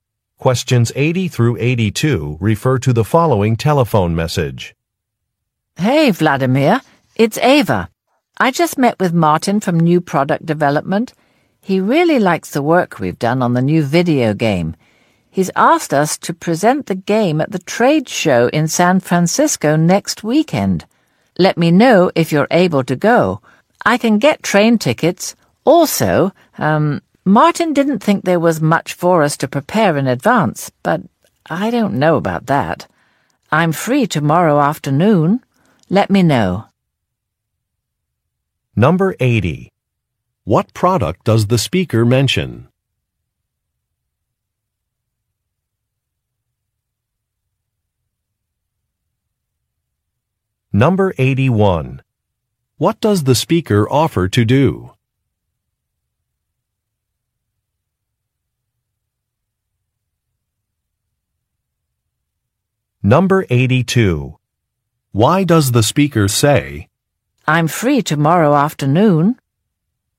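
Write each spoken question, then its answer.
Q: What product does the speaker mention?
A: A new video game

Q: What does the speaker offer to do?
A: Get train tickets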